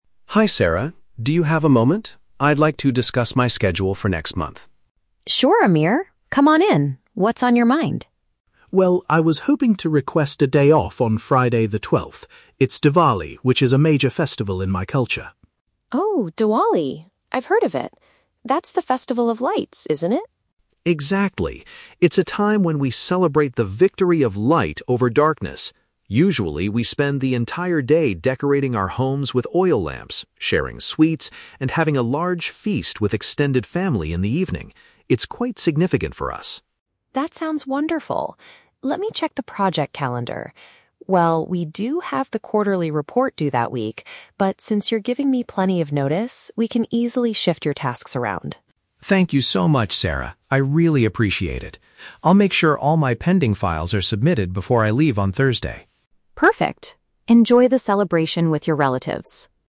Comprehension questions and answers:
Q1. Why is Amir asking for a day off?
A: To observe a traditional festival with his relatives.

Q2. How do people traditionally celebrate this holiday, according to Amir?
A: By lighting lamps, eating treats, and gathering for a big meal.

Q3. What does Amir promise to do before taking his leave?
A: He will complete his current work assignments prior to his departure.

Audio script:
Amir: Hi Sarah, do you have a moment? I'd like to discuss my schedule for next month.
Sarah: Sure, Amir. Come on in. What's on your mind?
Amir: Well, I was hoping to request a day off on Friday the 12th. It's Diwali, which is a major festival in my culture.
Sarah: Oh, Diwali! I've heard of it. That's the festival of lights, isn't it?
Amir: Exactly. It's a time when we celebrate the victory of light over darkness. Usually, we spend the entire day decorating our homes with oil lamps, sharing sweets, and having a large feast with extended family in the evening. It's quite significant for us.
Sarah: That sounds wonderful. Let me check the project calendar... Well, we do have the quarterly report due that week, but since you're giving me plenty of notice, we can easily shift your tasks around.
Amir: Thank you so much, Sarah. I really appreciate it. I'll make sure all my pending files are submitted before I leave on Thursday.